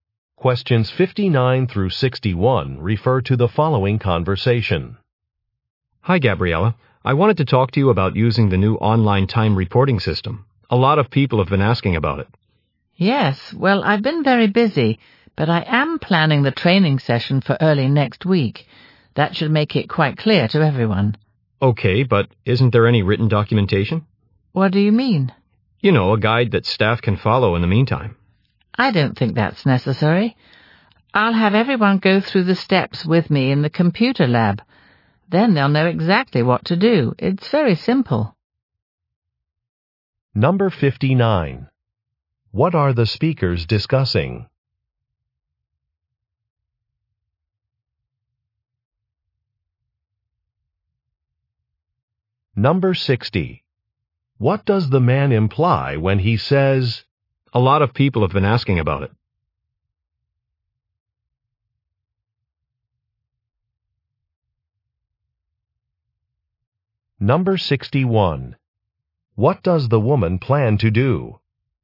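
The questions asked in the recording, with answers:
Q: What are the speakers discussing?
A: A new online time reporting system

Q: What does the woman plan to do?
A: Lead a training session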